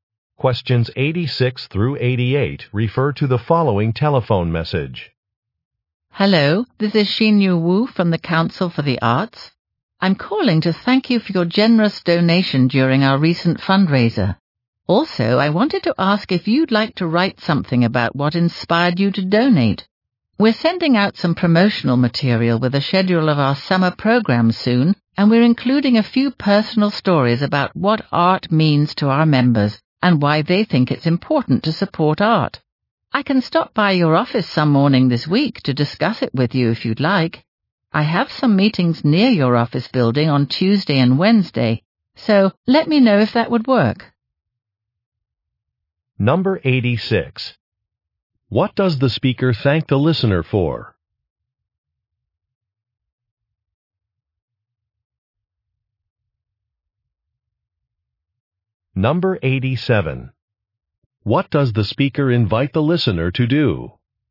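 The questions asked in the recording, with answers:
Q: What does the speaker thank the listener for?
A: A donation

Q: What does the speaker invite the listener to do?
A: Write about what inspired them to donate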